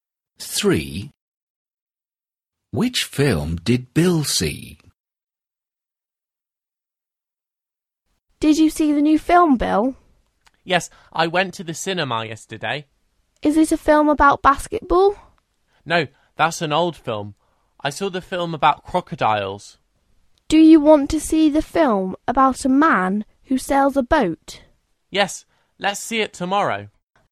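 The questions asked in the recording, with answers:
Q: Which film did Bill see?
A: the film about crocodiles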